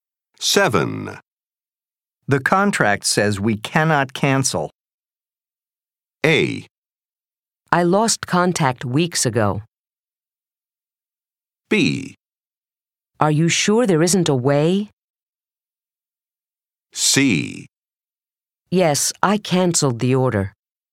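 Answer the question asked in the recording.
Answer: B: Are you sure there isn't a way?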